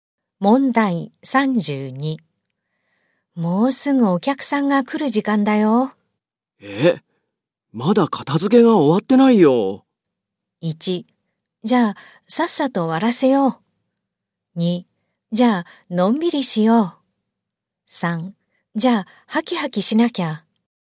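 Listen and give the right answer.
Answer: 1: じゃあ、さっさと終わらせよう。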